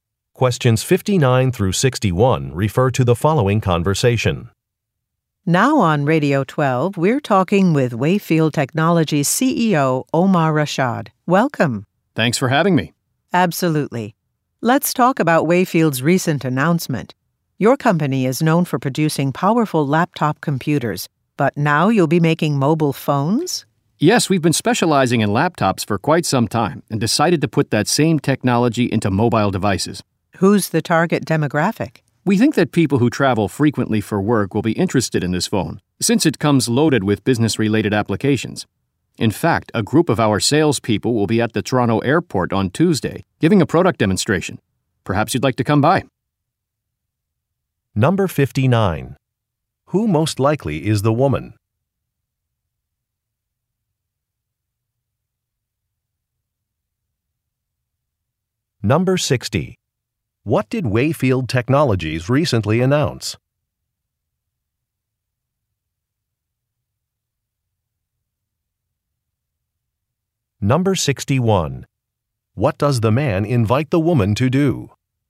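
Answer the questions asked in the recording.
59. A radio host
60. It will make mobile phones
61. Attend a product demonstration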